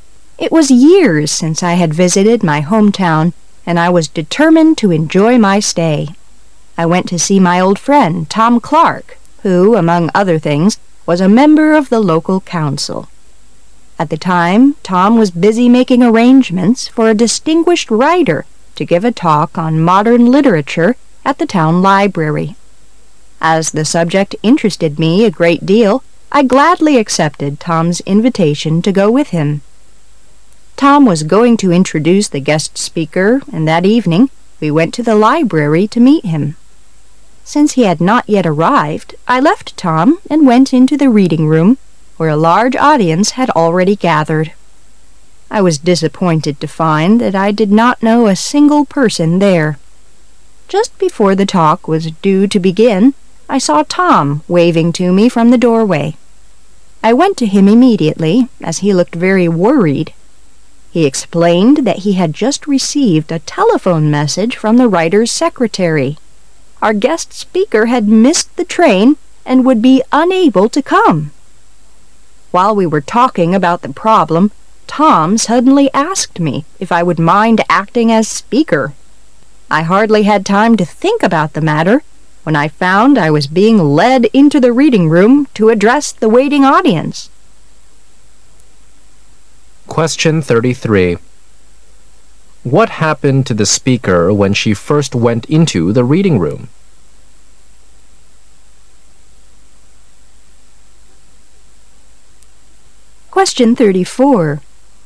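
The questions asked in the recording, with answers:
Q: What happened to the speaker when she first went into the reading room?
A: She found she did not know anyone there.

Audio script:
[解析] 33-35 It was years since I had visited my hometown and I was determined to enjoy my stay. I went to see my old friend, Tom Clark who, among other things, was a in ember of the Local Council. At the time Tom was busy making arrangements for a distinguished writer to give a talk on modem literature at the town library. As the subject interested me a great deal, I gladly accepted Tom's invitation to go with him. Tom was going to introduce the guest speaker and that evening we went to the library to meet him. Since he had not yet arrived, I left Tom and went into the Reading Room where a large audience had already gathered. I was disappointed to find that I did not know a single person there. Just before the talk was due to begin, I saw Tom waving to me from the doorway. 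I went to him immediately, as he looked very worried. He explained that he had just received a telephone message from the writer's secretary. Our guest speaker had missed the train and would be unable to come! While we were talking about the problem, Tom suddenly asked me if ! would mind acting as speaker. 1 hardly had time to think 'about the matter when I found I was being led into the Reading Room to address the waiting audience!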